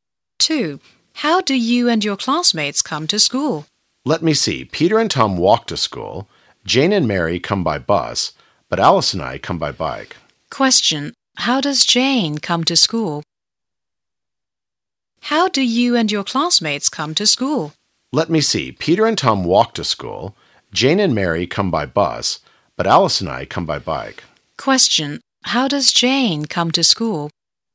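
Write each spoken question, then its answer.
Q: How does Jane come to school?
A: By bus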